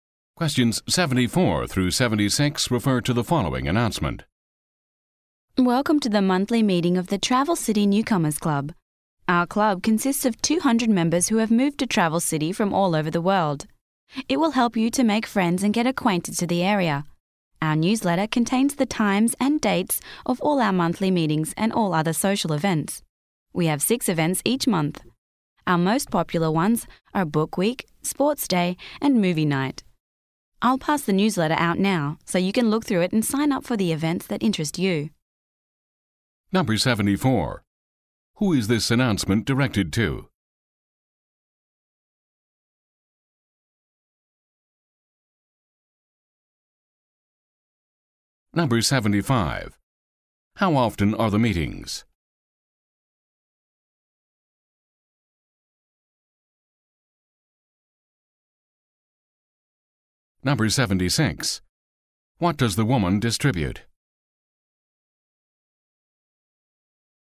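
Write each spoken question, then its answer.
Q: Who is this announcement directed to?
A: Newcomers to Travel City

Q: How often are the meetings?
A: Monthly

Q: What does the woman distribute?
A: The newsletter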